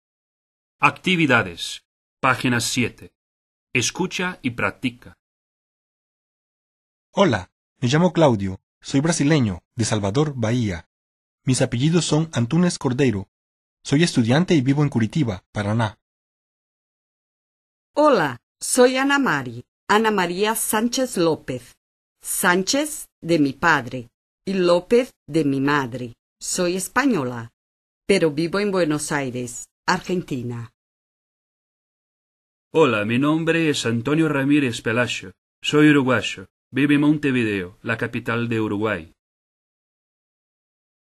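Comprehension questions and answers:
Completa los diálogos con lo que escuches y enseguida, repítelos.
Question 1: - Hola, [blank_start]me llamo[blank_end] Claudio. [blank_start]Soy brasileño[blank_end], de Salvador, Bahia. Mis [blank_start]apellidos[blank_end] son Antunes Cordeiro. Soy [blank_start]estudiante[blank_end] y vivo en Curitiba, Paraná.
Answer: me llamo; Soy brasileño; apellidos; estudiante

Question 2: - [blank_start]Hola[blank_end], soy Anamari. Ana María Sánchez López. Sánchez de mi padre y López de mi madre. Soy española, pero [blank_start]vivo en[blank_end] Buenos Aires, Argentina.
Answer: Hola; vivo en

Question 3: - Hola, [blank_start]mi nombre es[blank_end] Antonio Ramírez Pelayo. [blank_start]Soy Uruguayo[blank_end]. Vivo en Montevideo, la capital de Uruguay.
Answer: mi nombre es; Soy uruguayo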